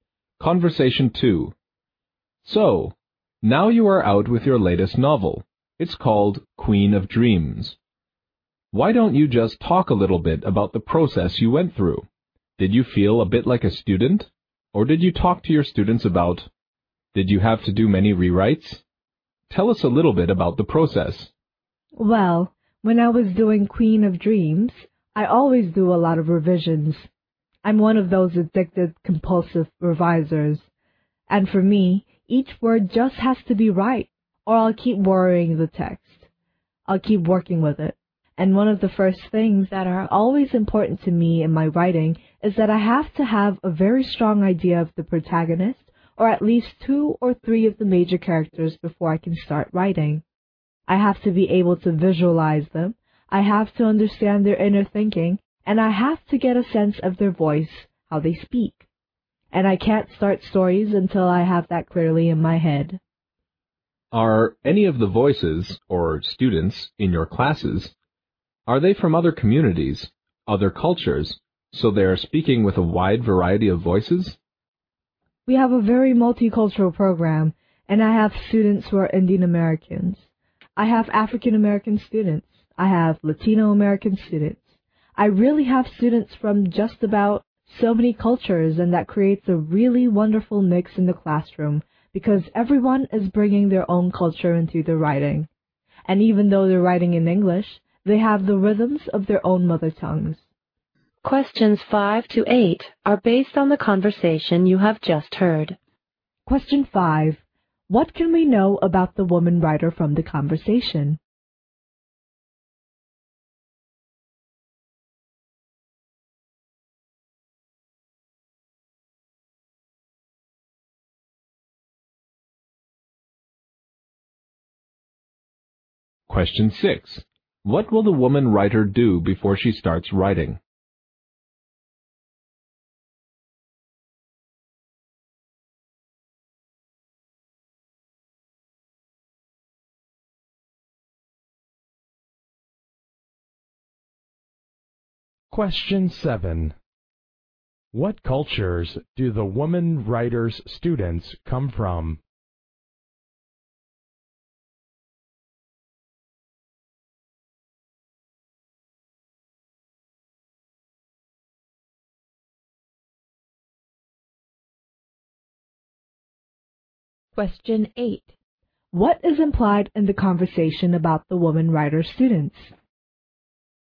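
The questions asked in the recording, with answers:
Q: What will the woman writer do before she starts writing?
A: Get a strong idea of the main characters: picture them and understand how they think and speak

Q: What cultures do the woman writer's students come from?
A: Many cultures: Indian American, African American and Latino American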